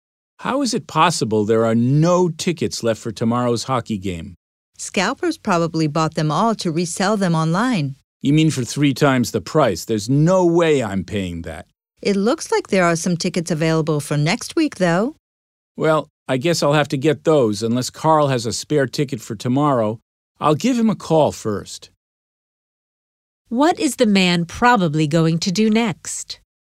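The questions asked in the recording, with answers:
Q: What is the man probably going to do next?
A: Call Carl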